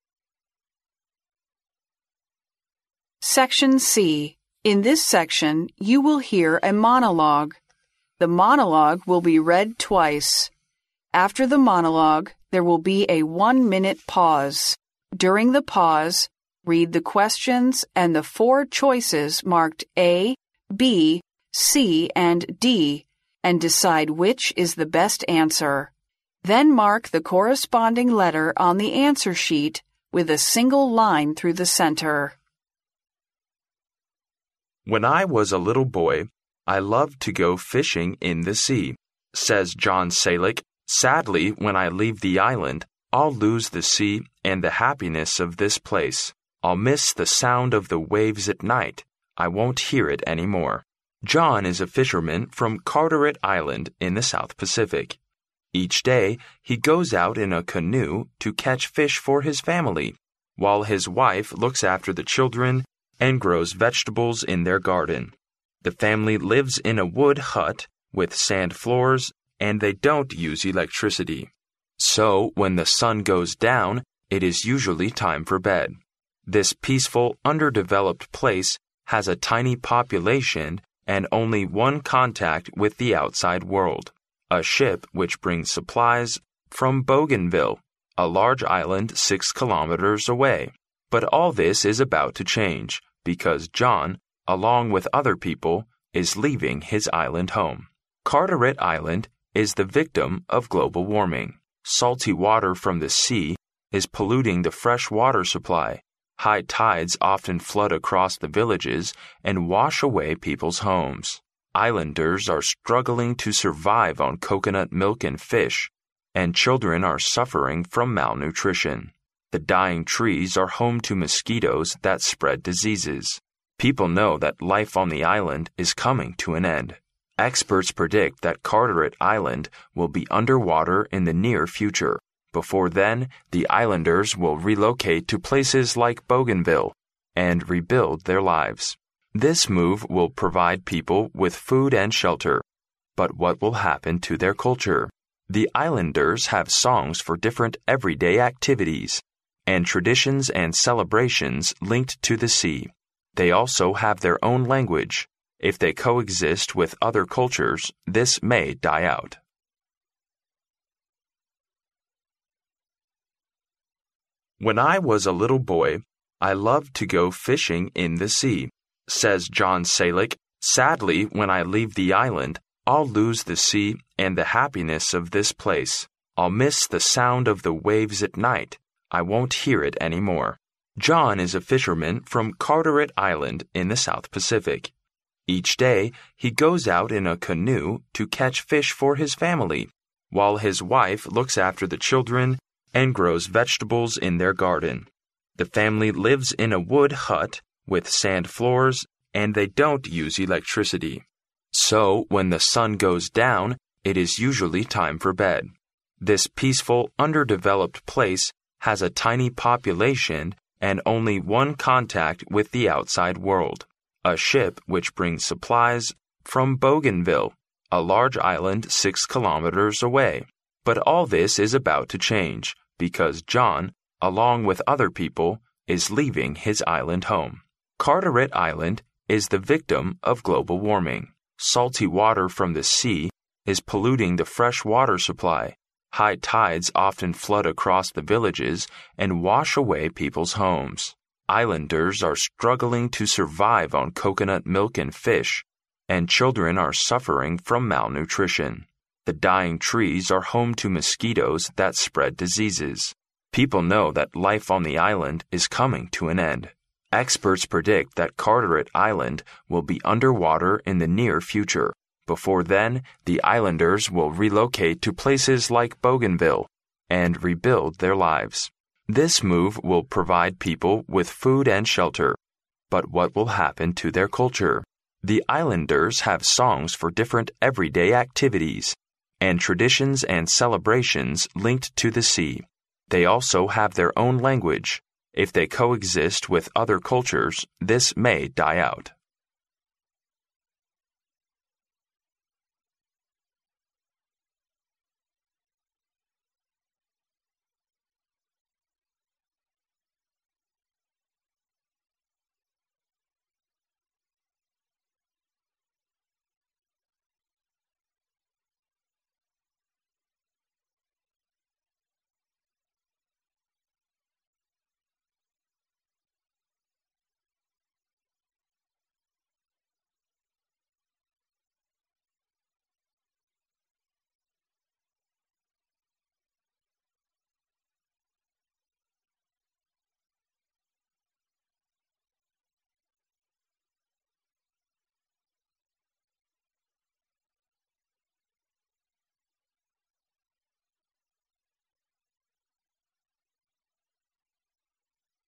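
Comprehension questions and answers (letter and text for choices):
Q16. Why is John sad?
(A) He has a miserable childhood.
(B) He misses friends from his community.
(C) He does not want to leave the island.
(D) He does not like to hear the sea at night.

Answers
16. (C) He does not want to leave the island.

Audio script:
"When I was a little boy, I loved to go fishing in the sea," says John Sailike, sadly. "When I leave the island, I'll lose the sea and the happiness of this place. I'll miss the sound of the waves at night ... I won't hear it anymore."
John is a fisherman from Carteret Island in the South Pacific. Each day, he goes out in a canoe to catch fish for his family, while his wife looks after the children and grows vegetables in their garden. The family lives in a wood hut with sand floors and they don't use electricity, so when the sun goes down it is usually time for bed. This peaceful, underdeveloped place has a tiny population and only one contact with the outside world—a ship which brings supplies from Bougainville, a large island 6 km away. 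But all this is about to change, because John, along with other people, is leaving his island home.
Carteret Island is the victim of global warming. Salty water from the sea is polluting the fresh water supply. High tides often flood across the villages and wash away people's homes. Islanders are struggling to survive on coconut milk and fish, and children are suffering from malnutrition. The dying trees are home to mosquitoes that spread diseases. People know that life on the island is coming to an end.
Experts predict that Carteret Island will be under water in the near future. Before then, the islanders will relocate to places like Bougainville and rebuild their lives. This move will provide people with food and shelter, but what will happen to their culture? The islanders have songs for different everyday activities, and traditions and celebrations linked to the sea. They also have their own language. 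If they co-exist with other cultures, this may die out.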